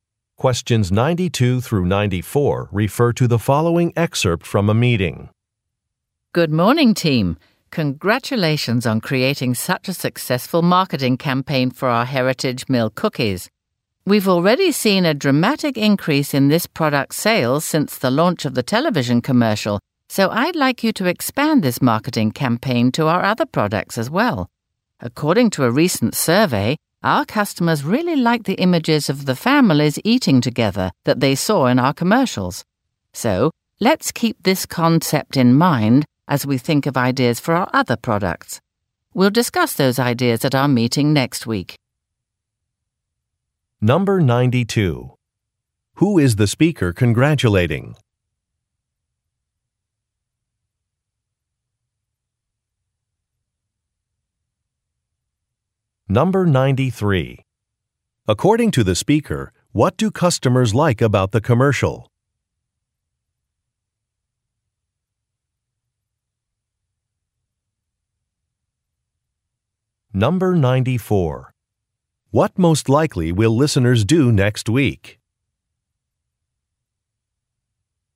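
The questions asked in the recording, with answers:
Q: Who is the speaker congratulating?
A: The marketing team

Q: According to the speaker, what do customers like about the commercial?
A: The images of families eating together

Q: What most likely will listeners do next week?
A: Discuss marketing ideas for other products at a meeting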